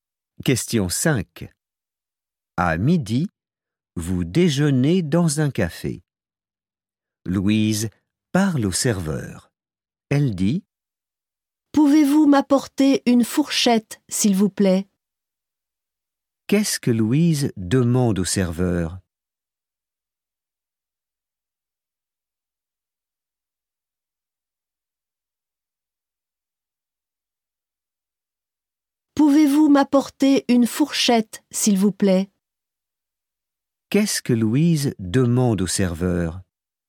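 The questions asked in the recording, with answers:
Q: Qu'est-ce que Louise demande au serveur?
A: Une fourchette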